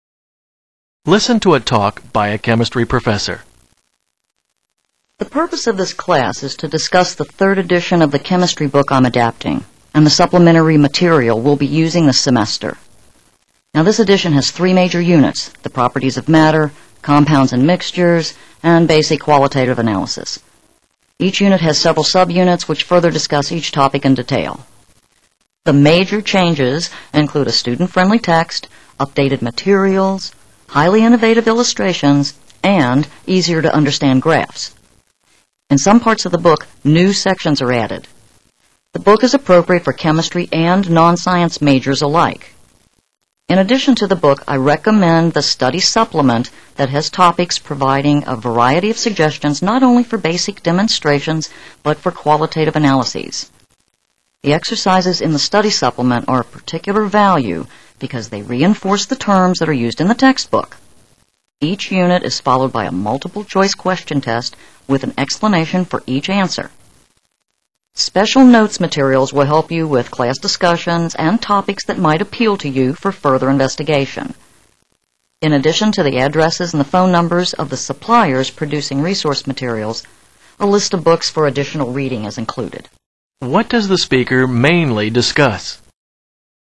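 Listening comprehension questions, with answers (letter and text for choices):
What does the speaker mainly discuss?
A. The Properties of Matter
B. A revised book along with its supplement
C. Test-taking strategies for non-science majors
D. The major suppliers of resource materials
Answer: B. A revised book along with its supplement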